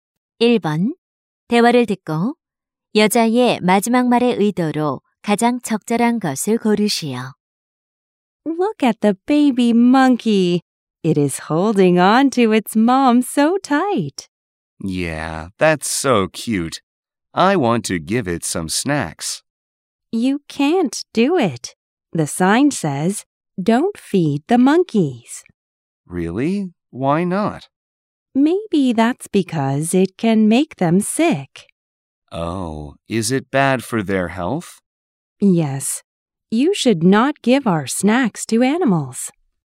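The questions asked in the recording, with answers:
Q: 대화를 듣고 여자의 마지막 말의 의도로 가장 적절한 것을 고르시오.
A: 동물에게 과자를 주지 말라고 충고(경고)하기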